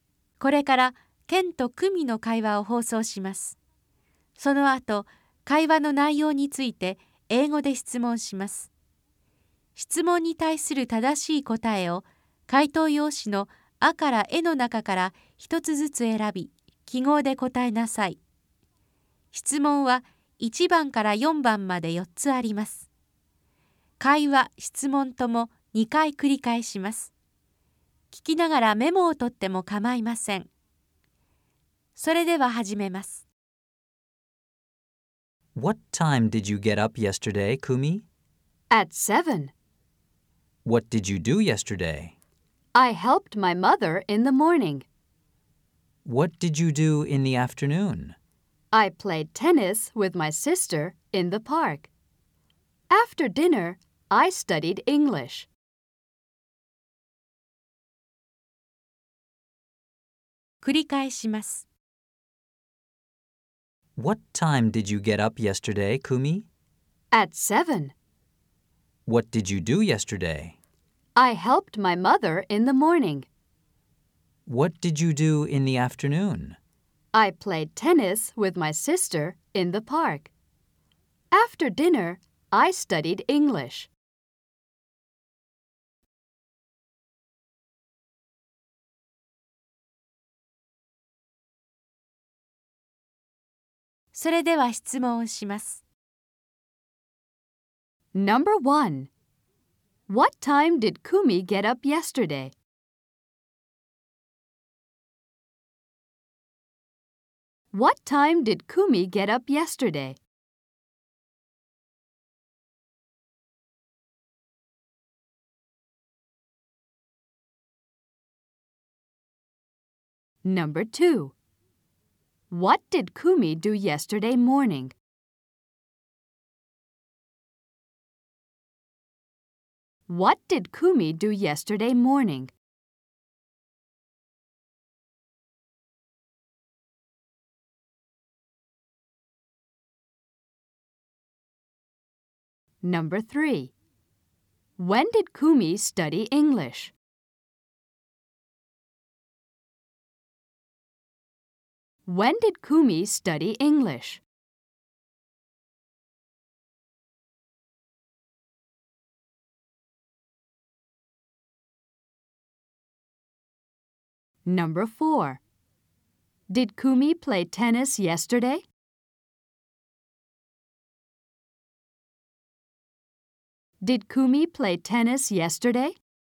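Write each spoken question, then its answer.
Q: What time did Kumi get up yesterday?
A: At 7

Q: What did Kumi do yesterday morning?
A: She helped her mother.

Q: When did Kumi study English?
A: After dinner

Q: Did Kumi play tennis yesterday?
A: Yes, she did.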